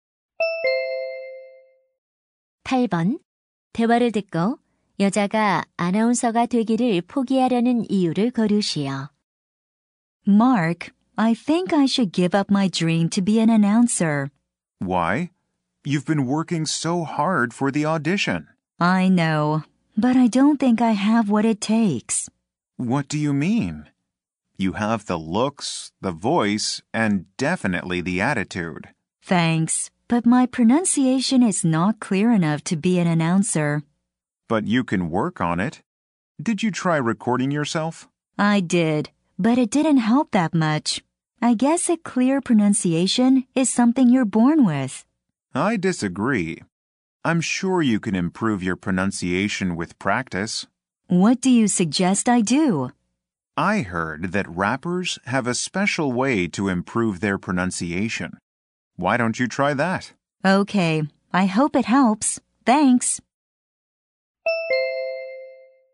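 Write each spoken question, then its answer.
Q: 대화를 듣고 여자가 아나운서가 되기를 포기하려는 이유를 거르시오.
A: 발음이 충분히 명확하지 않아서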